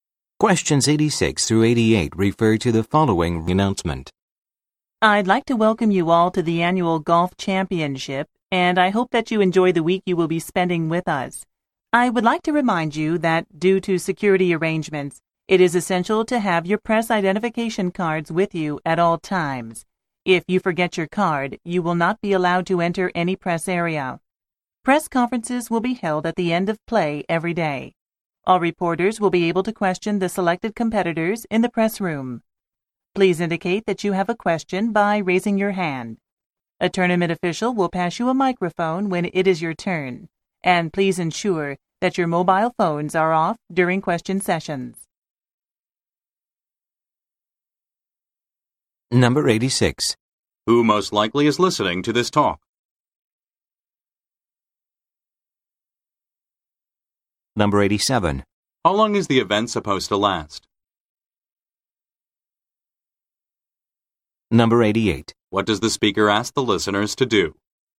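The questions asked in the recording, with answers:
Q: Who most likely is listening to this talk?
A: Reporters (the press)

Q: How long is the event supposed to last?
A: A week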